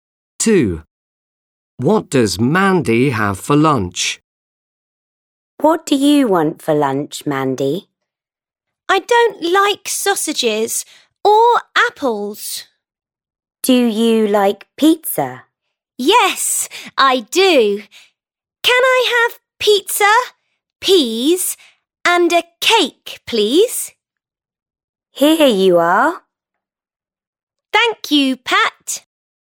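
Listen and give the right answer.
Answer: Pizza, peas and a cake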